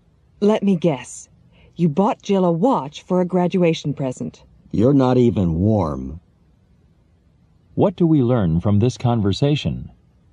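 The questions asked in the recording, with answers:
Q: What do we learn from this conversation?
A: The guess is wrong; Jill didn't get a watch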